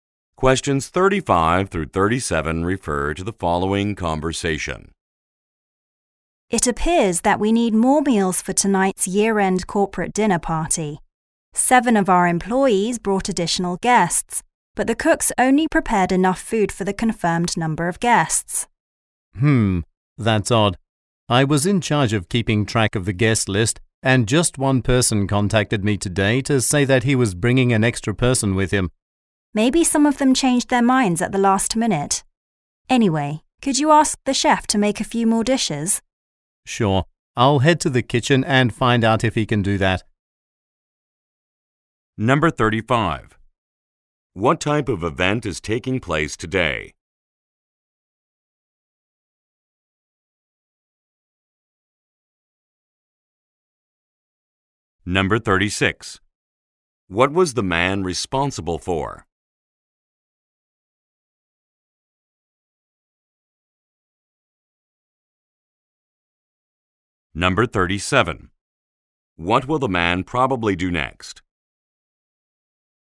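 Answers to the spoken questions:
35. A year-end corporate dinner party
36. Keeping track of the guest list
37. Go to the kitchen to talk to the chef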